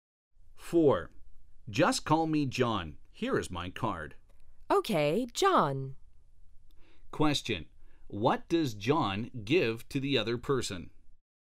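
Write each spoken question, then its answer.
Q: What does John give to the other person?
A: His card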